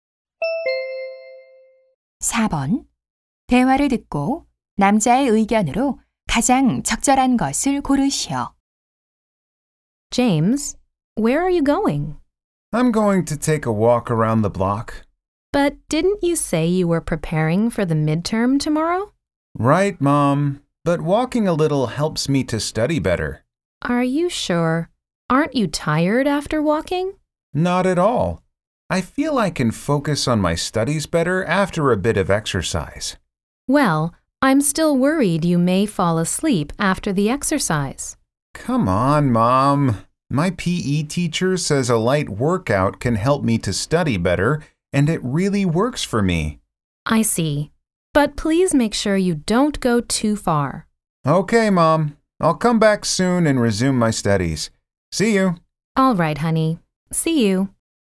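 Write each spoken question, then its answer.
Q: 대화를 듣고 남자의 의견으로 가장 적절한 것을 고르시오.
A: 가벼운 운동은 공부에 도움이 된다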